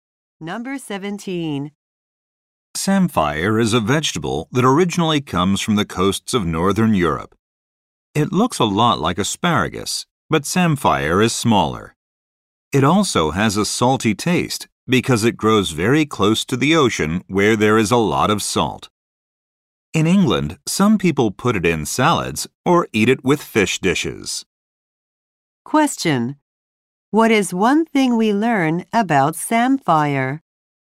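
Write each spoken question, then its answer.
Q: What is one thing we learn about samphire?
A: It has a salty taste because it grows near the ocean.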